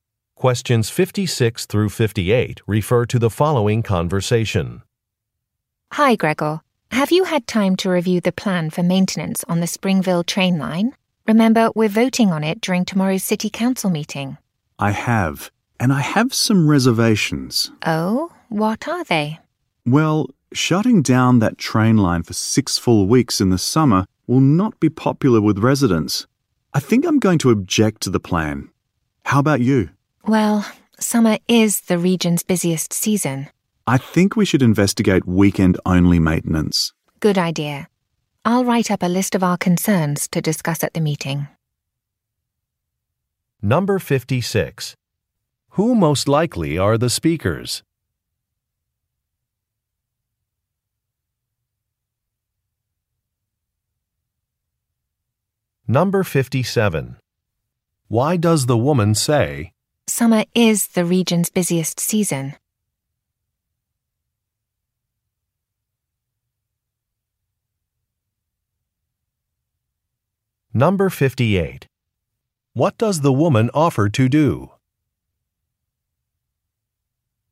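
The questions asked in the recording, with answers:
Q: Who most likely are the speakers?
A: City council members

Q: Why does the woman say,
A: She agrees closing the line in summer is a bad idea

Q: What does the woman offer to do?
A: Write up a list of concerns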